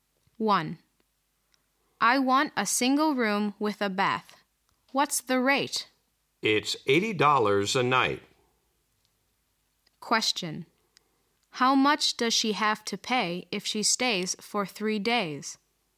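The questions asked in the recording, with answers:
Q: How much does she have to pay if she stays for 3 days?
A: $240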